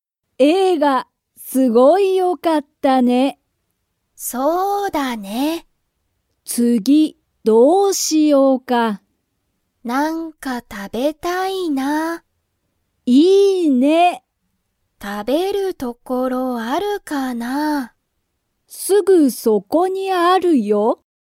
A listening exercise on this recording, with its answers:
すぐそこに、食たべる所ところはありますか?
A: はい

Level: Level 1